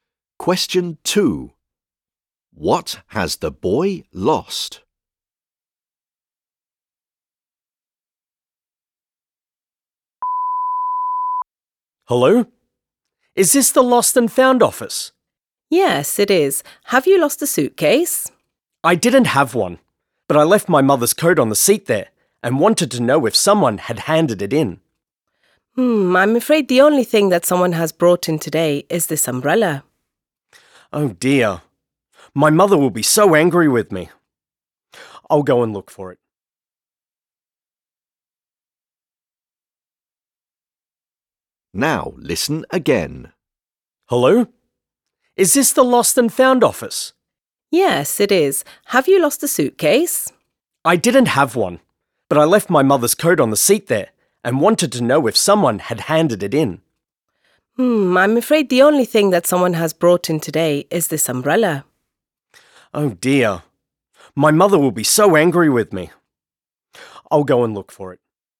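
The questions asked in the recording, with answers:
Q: What has the boy lost?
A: His mother's coat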